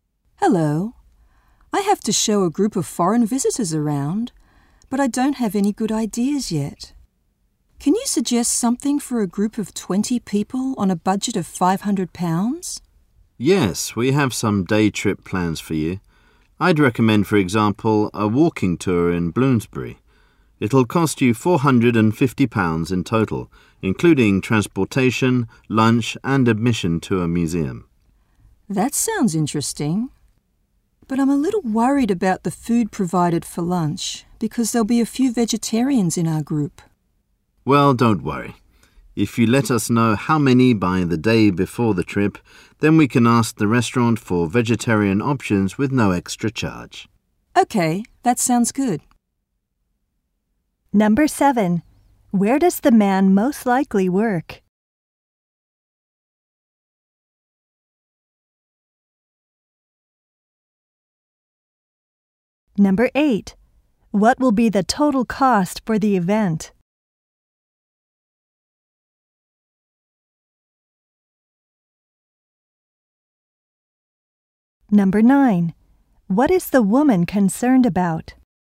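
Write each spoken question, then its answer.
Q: Where does the man most likely work?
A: At a travel agency

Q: What will be the total cost for the event?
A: £450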